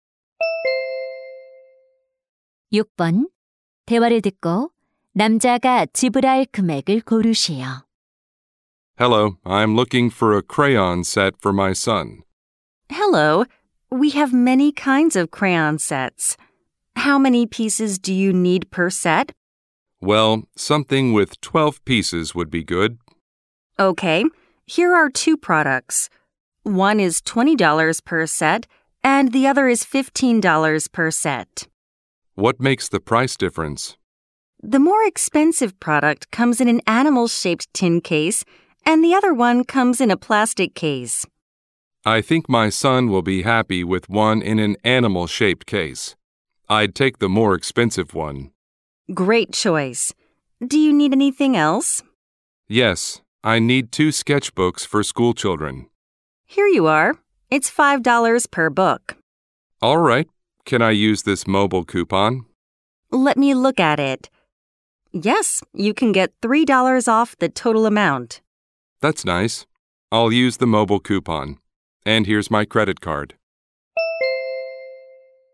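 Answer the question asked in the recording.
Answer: $27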